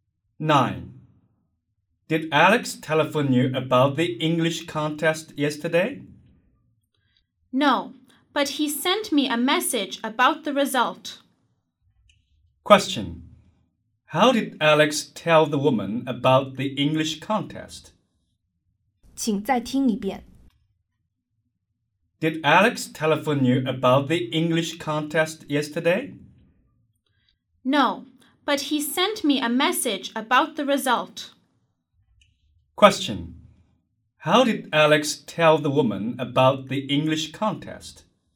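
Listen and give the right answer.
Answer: By sending her a message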